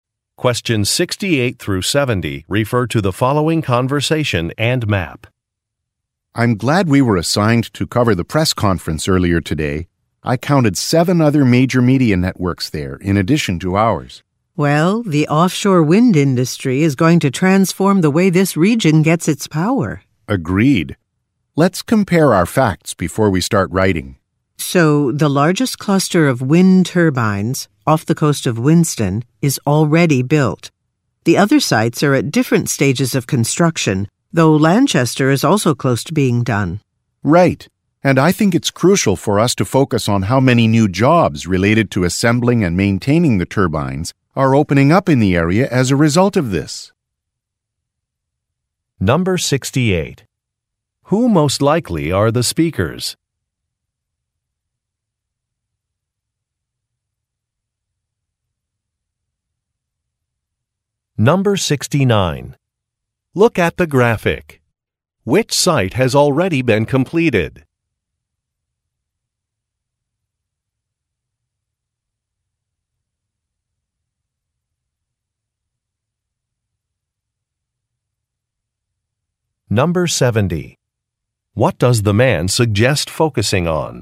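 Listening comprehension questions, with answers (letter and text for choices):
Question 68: Who most likely are the speakers?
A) Urban planners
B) Journalists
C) Engineers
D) Environmental scientists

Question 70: What does the man suggest focusing on?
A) Work opportunities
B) Wind turbine costs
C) Supply chain issues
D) Power capacity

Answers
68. B) Journalists
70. A) Work opportunities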